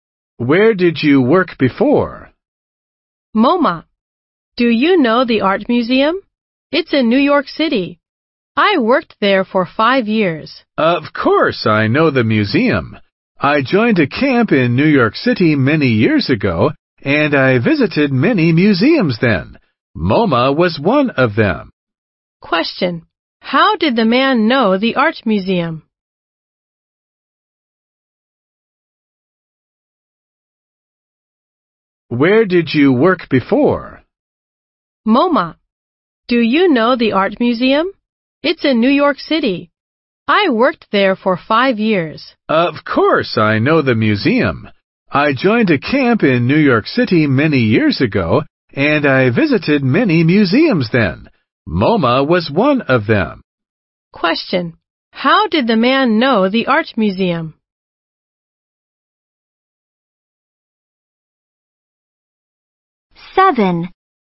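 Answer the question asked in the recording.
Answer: He visited it when he joined a camp in New York City many years ago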